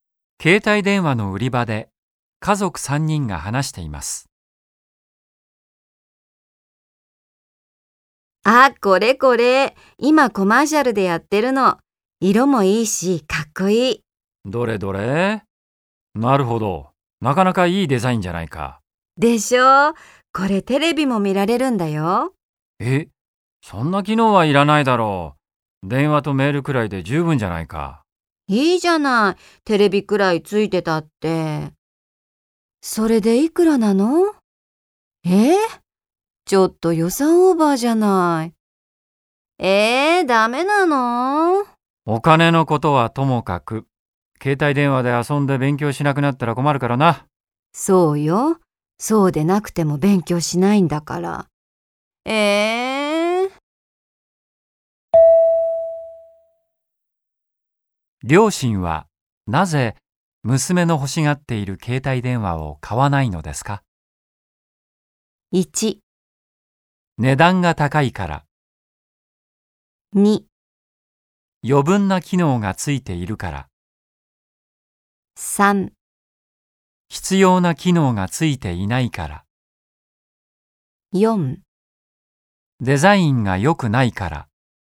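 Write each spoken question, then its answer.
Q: 両親はなぜ娘の欲しがっている携帯電話を買わないのですか?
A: 2: 余分な機能がついているから。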